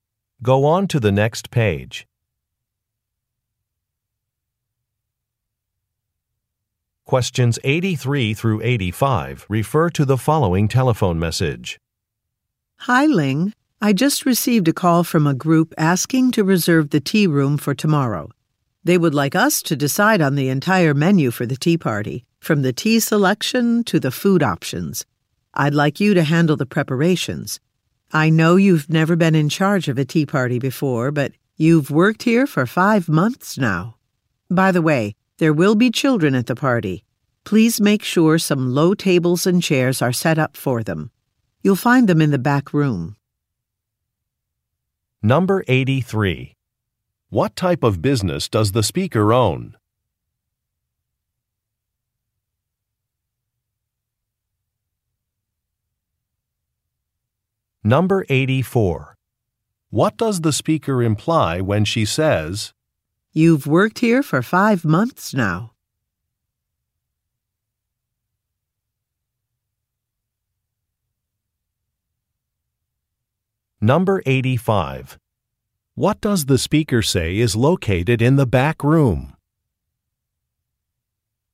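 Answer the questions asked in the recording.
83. A tea room
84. Ling is experienced enough to handle it
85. Low tables and chairs for children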